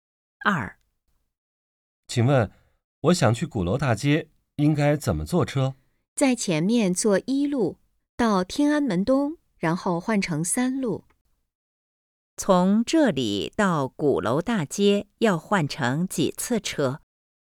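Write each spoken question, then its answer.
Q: 从这里到鼓楼大街要换成几次车?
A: 一次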